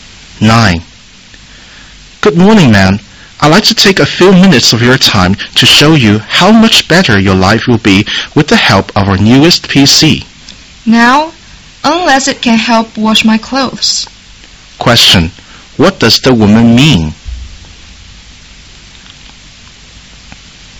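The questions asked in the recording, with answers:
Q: What does the woman mean?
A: She is not interested in buying the new PC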